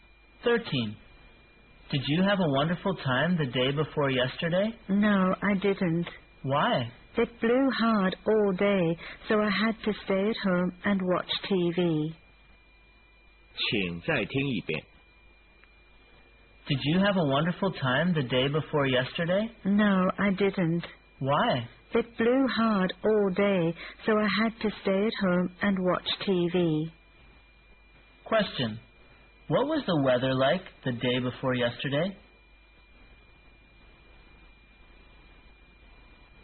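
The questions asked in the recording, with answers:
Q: What was the weather like the day before yesterday?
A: Windy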